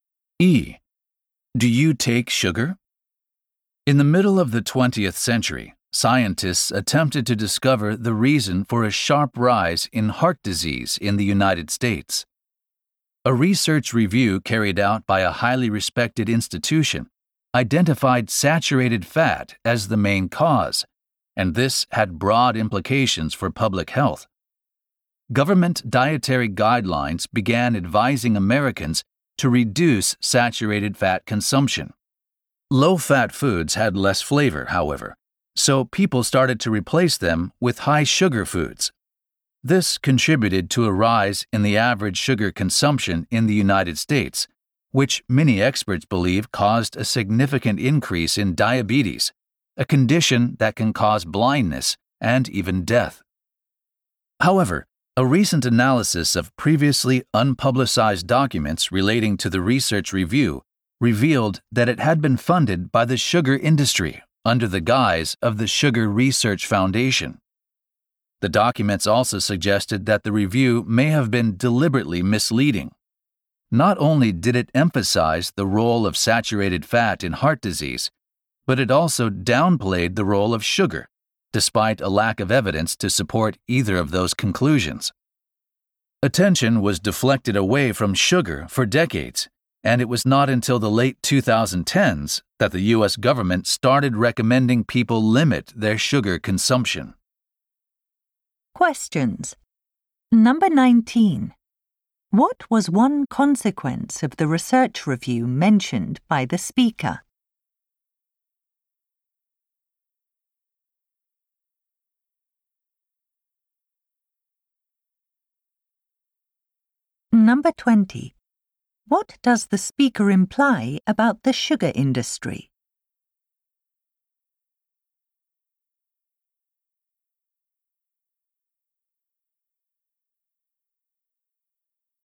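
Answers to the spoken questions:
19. People replaced low-fat foods with high-sugar foods, raising sugar consumption and possibly diabetes.
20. It funded a misleading review to shift blame away from sugar.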